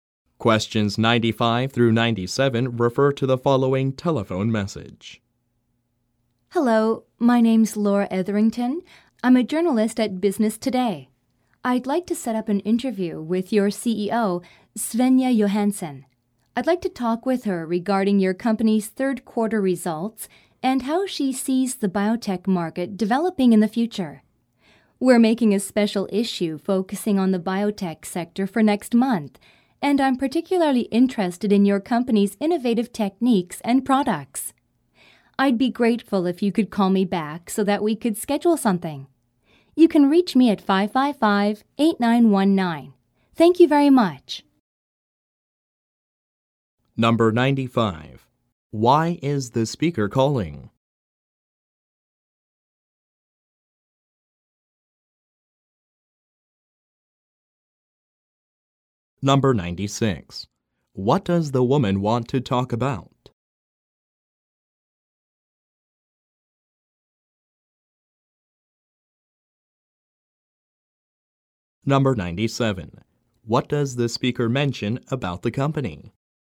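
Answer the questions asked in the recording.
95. To set up an interview with the CEO
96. The company's third quarter results and the future of the biotech market
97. It has innovative techniques and products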